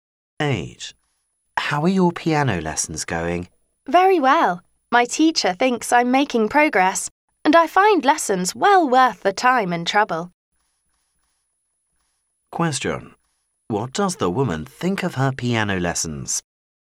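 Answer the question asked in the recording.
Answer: They are worth the time and trouble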